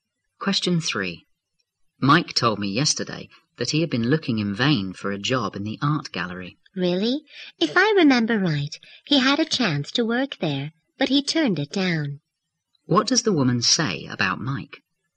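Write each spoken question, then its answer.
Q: What does the woman say about Mike?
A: He turned down a chance to work at the art gallery.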